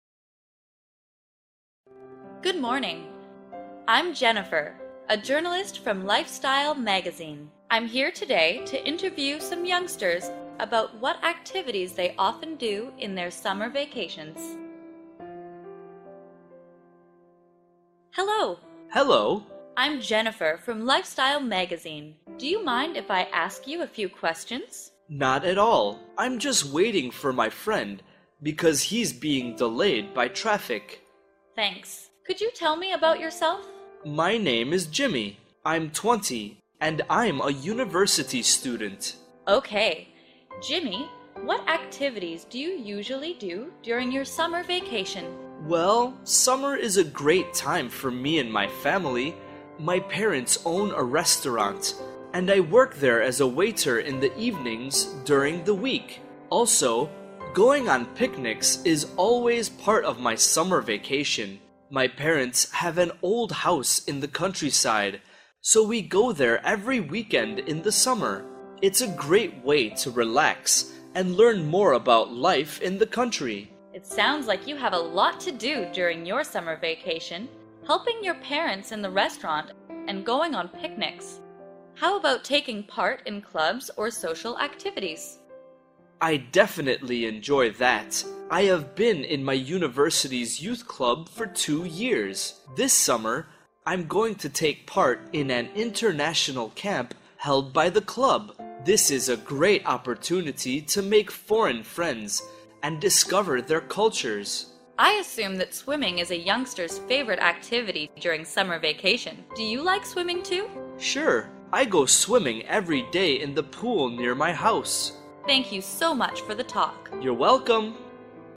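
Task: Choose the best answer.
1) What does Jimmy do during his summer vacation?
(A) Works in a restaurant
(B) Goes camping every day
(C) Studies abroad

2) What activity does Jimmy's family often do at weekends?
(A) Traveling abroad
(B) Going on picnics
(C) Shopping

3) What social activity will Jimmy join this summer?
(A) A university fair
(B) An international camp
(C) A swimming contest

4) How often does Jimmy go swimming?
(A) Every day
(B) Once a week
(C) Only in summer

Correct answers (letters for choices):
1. A
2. B
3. B
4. A

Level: lớp 8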